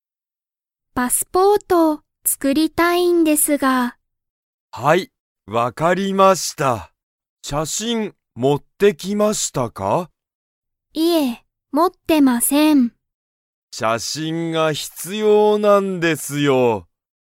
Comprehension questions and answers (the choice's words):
ハルは、写真(しゃしん)を持(も)ってきましたか?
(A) はい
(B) いいえ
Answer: いいえ